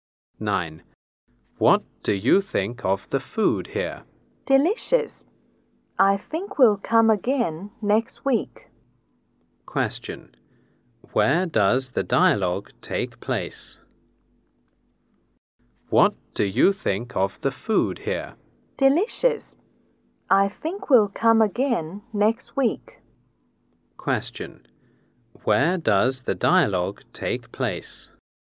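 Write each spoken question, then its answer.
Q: Where does the dialogue take place?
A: In a restaurant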